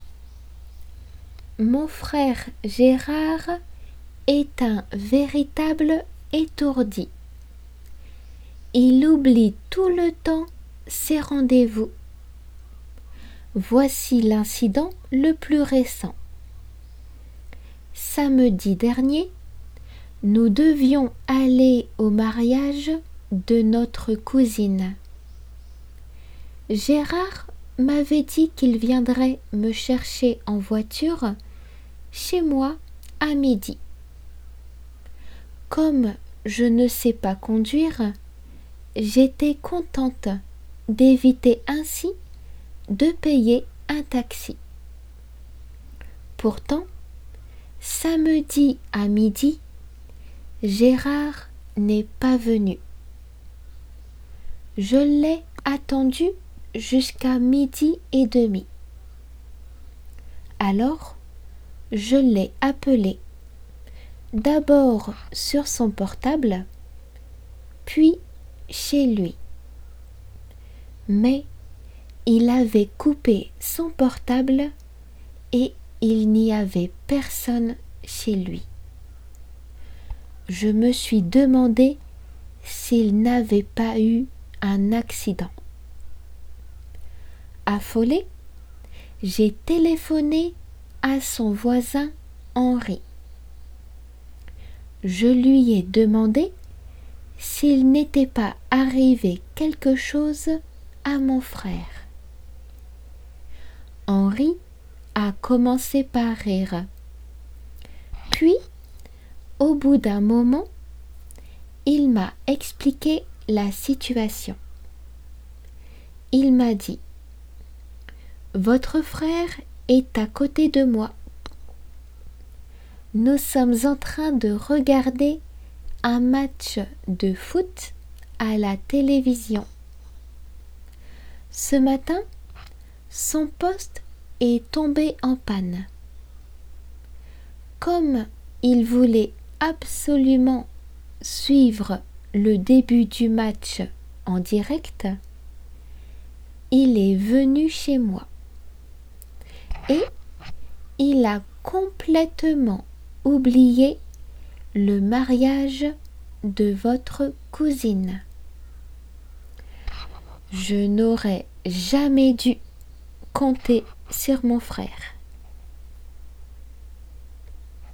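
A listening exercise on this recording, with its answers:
良く聞いて後の質問に 正 誤で答えましょう。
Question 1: Gérard n'oublie jamais ses rendez-vous.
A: faux

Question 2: Samedi dernier, Antoinette et Gérard devaient aller au mariage de leur cousin,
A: faux

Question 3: Gérard avait promis à Antoinette de venir la chercher à midi moins cinq.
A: faux

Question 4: Antoinette n'a pas le permis de conduire.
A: vrai

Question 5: Comme Gérard n'était pas venu à midi, Antoinette lui a téléphoné sans attendre une minute.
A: faux

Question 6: Comme Antoinette était inquite, elle a appelé le voisin de son frère.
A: vrai

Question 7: Gerard était en train de rgarder un match de foot quand Henri a reçu le coup de fil d'Antoinette.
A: vrai

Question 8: Le poste de télévision de G'erard est tombé en panne samedi matin.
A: vrai

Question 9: Selon Henri, Gerard a préféré suivre en direct le match plutôt que de se rendre au mariage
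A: faux

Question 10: Antoinette regrette d'avoir compté sur son frère.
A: vrai

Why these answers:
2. cousin cousine を聞き間違えないように。
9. の文意を正確に把握しましょう。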